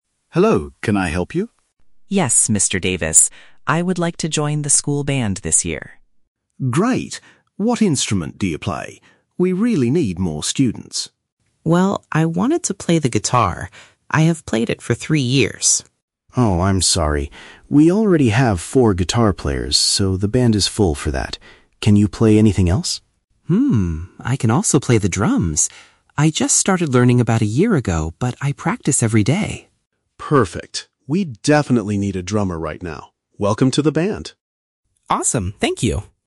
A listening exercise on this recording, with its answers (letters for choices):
Listen to the conversation between a student and a music teacher. Choose the correct answer (A, B, or C) for each question.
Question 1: What instrument did the student want to play at first?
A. The drums.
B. The piano.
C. The guitar.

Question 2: Why can't the student play his favorite instrument in the band?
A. Because he doesn't have the instrument.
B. Because the band already has enough people playing it.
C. Because he only played it for one year.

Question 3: How long has the student played the drums?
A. One year.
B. Three years.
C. Four years.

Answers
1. C
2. B
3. A

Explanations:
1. The student says his initial plan clearly: "I wanted to play the guitar." Option (A) is a trap because the drums are what he actually plays at the end (The Twist). Option (B) is a plausible instrument but is never mentioned in the audio.
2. The teacher says, "We already have four guitar players, so the band is full for that." (Paraphrasing: "full" = "has enough people"). Option (A) is not mentioned. Option (C) is a trap; "one year" is his experience with the drums, not the reason he was rejected for the guitar.
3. When talking about the drums, the boy says: "I just started learning about a year ago." Option (B) is a trap because three years is how long he has played the guitar. Option (C) is a trap using the number "four" (which is the number of guitar players in the band).

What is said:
Teacher: Hello, can I help you?
Student: Yes, Mr. Davis. I would like to join the school band this year.
Teacher: Great! What instrument do you play? We really need more students.
Student: Well, I wanted to play the guitar. I have played it for three years.
Teacher: Oh, I'm sorry. We already have four guitar players, so the band is full for that. Can you play anything else?
Student: Hmm, I can also play the drums. I just started learning about a year ago, but I practice every day.
Teacher: Perfect! We definitely need a drummer right now. Welcome to the band!